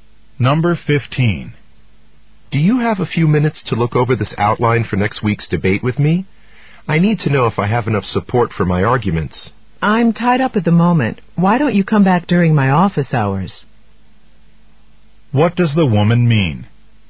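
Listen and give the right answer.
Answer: She's busy now; he should come back during her office hours.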